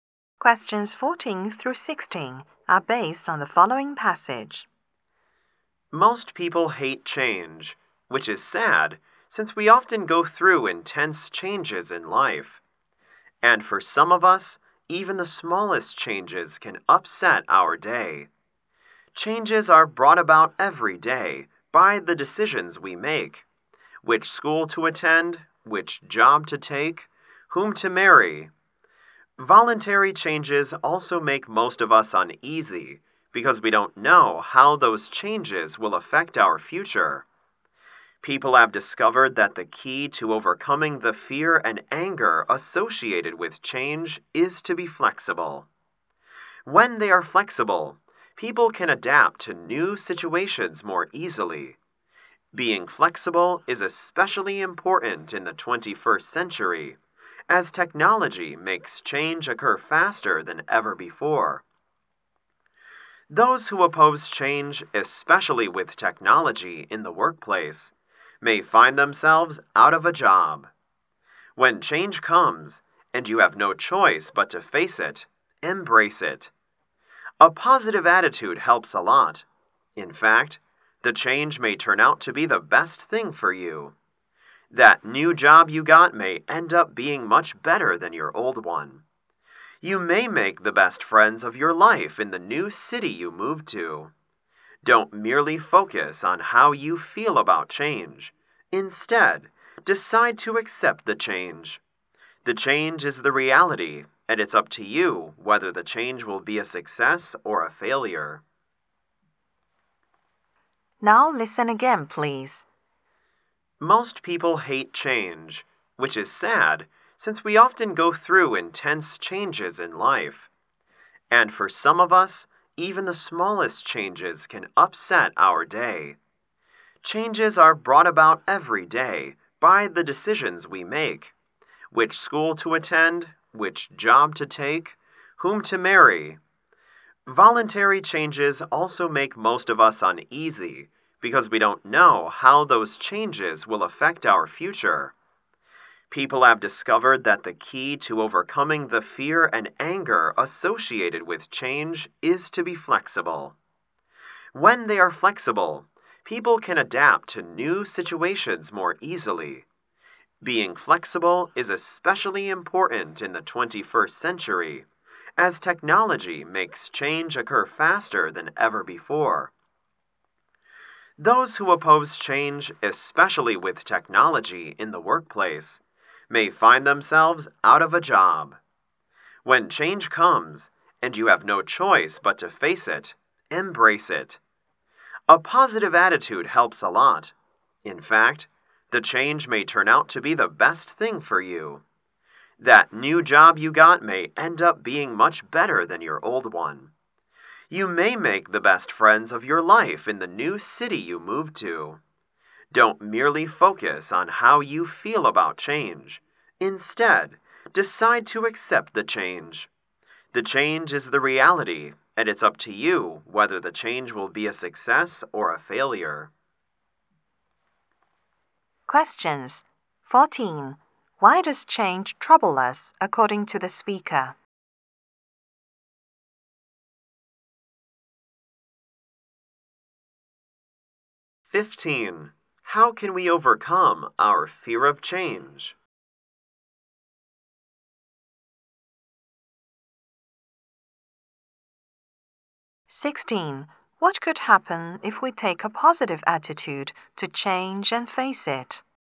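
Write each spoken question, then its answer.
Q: Why does change trouble us, according to the speaker?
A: We don't know how changes will affect our future.

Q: How can we overcome our fear of change?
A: By being flexible.

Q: What could happen if we take a positive attitude to change and face it?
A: The change may turn out to be the best thing for us.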